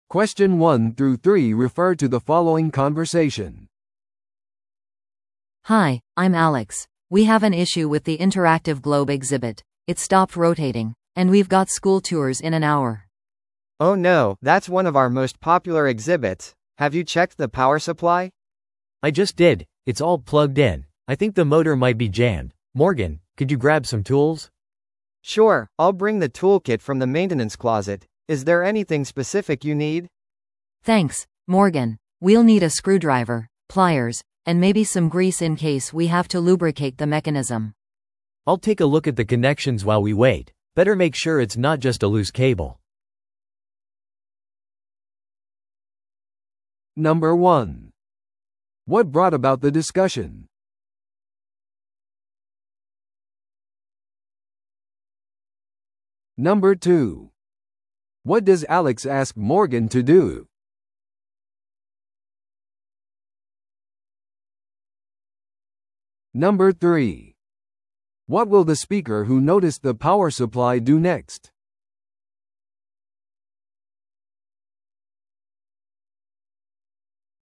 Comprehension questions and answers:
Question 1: What brought about the discussion?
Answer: 学校の見学ツアーが始まる前に展示の一つが故障した。

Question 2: What does Alex ask Morgan to do?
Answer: 展示修理用の工具を持ってくること。

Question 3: What will the speaker who noticed the power supply do next?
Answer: ゆるんでいるケーブルがないか展示の接続を検査する。

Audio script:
A: Hi, I'm Alex. We have an issue with the interactive globe exhibit. It stopped rotating, and we've got school tours in an hour.
B: Oh no, that's one of our most popular exhibits. Have you checked the power supply?
C: I just did, it's all plugged in. I think the motor might be jammed. Morgan, could you grab some tools?
B: Sure, I'll bring the toolkit from the maintenance closet. Is there anything specific you need?
A: Thanks, Morgan. We'll need a screwdriver, pliers, and maybe some grease in case we have to lubricate the mechanism.
C: I'll take a look at the connections while we wait. Better make sure it's not just a loose cable.